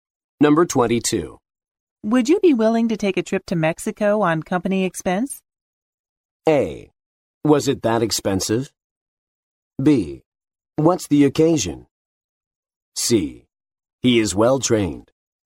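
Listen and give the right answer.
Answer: B: What's the occasion?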